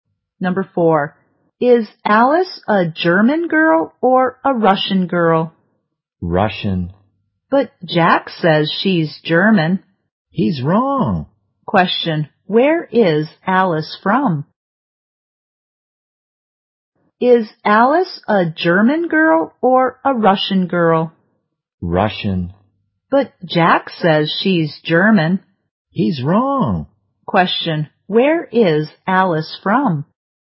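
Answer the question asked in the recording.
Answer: Russia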